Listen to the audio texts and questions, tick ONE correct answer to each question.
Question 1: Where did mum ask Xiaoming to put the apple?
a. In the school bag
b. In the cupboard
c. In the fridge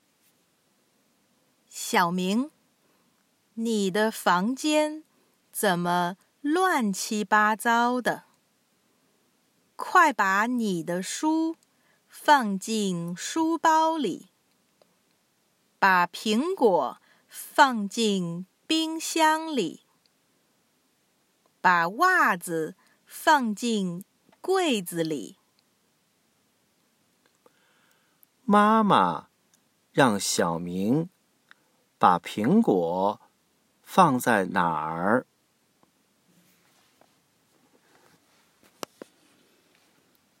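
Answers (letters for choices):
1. c

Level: Intermediate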